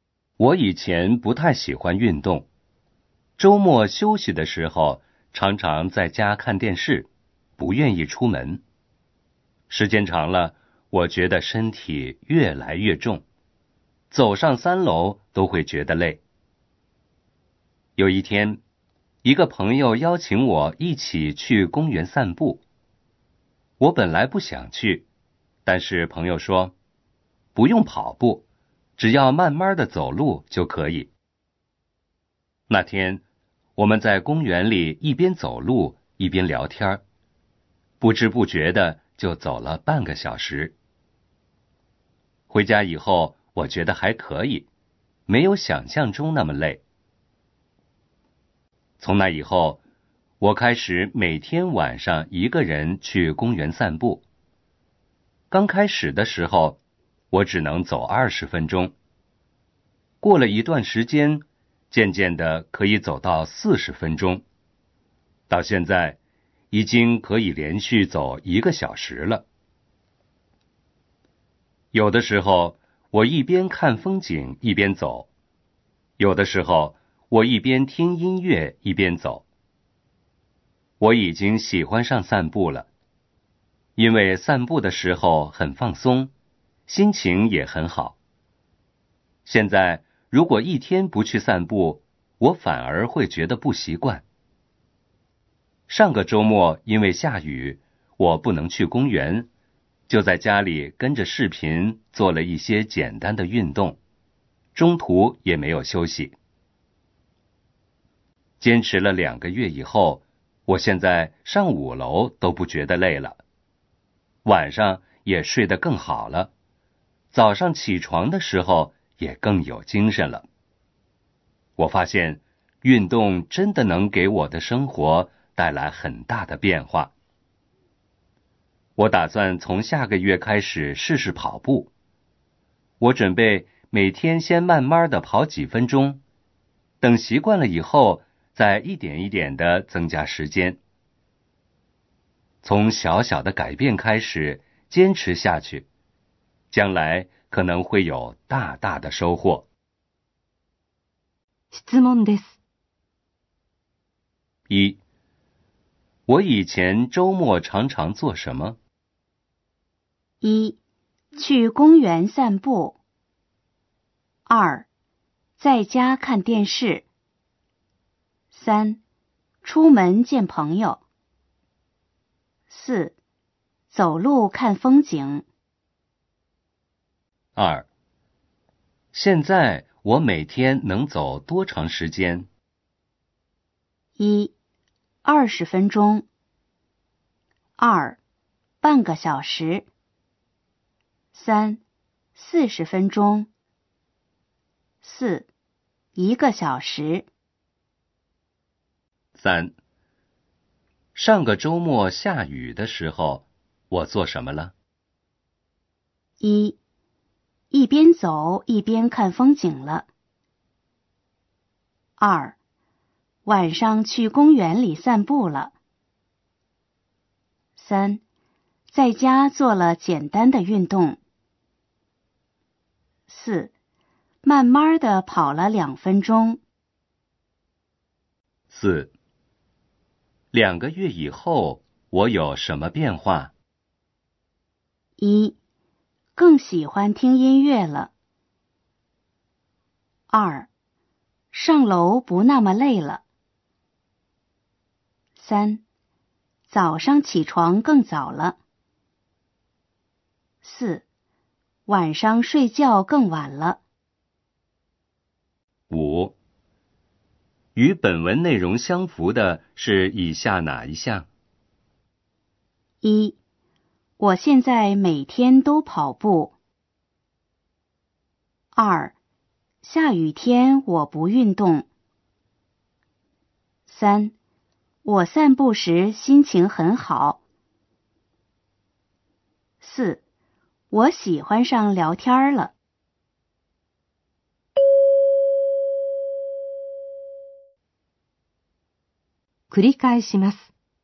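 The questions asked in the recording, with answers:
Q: 我以前周末常常做什么?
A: 2: 在家看电视。

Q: 现在我每天能走多长时间?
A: 4: 1个小时。

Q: 上个周末下雨的时候,我做什么了?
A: 3: 在家做了简单的运动。

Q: 2个月以后,我有什么变化?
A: 2: 上楼不那么累了。

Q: 与本文内容相符的是以下哪一项?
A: 3: 我散步时心情很好。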